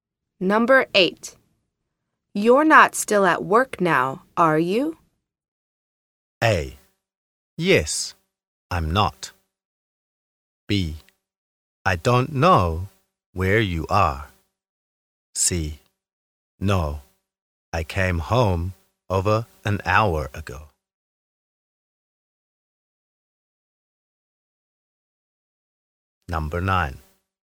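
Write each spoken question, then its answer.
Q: You're not still at work now, are you?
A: C: No, I came home over an hour ago.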